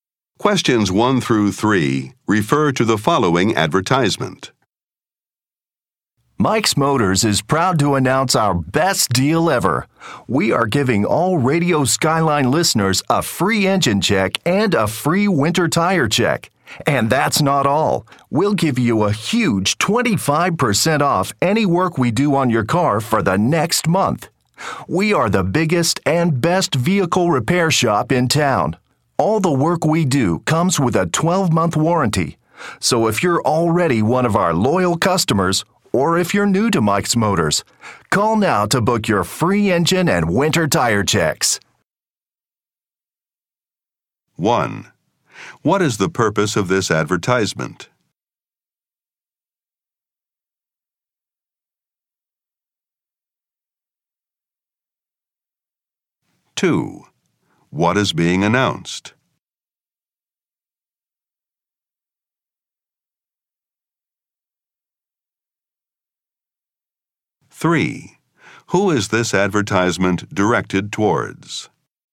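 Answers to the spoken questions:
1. To offer free engine and winter tire checks and a discount
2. Mike's Motors' best deal ever: free checks and 25% off repairs
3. Radio Skyline listeners / car owners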